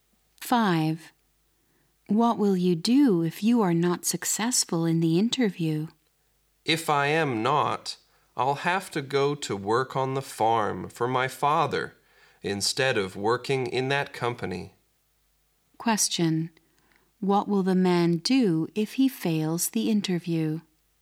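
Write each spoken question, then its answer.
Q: What will the man do if he fails the interview?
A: Work on his father's farm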